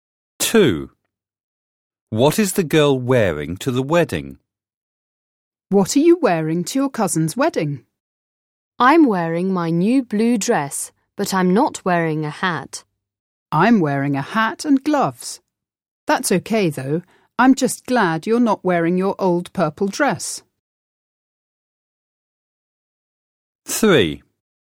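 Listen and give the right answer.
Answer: Her new blue dress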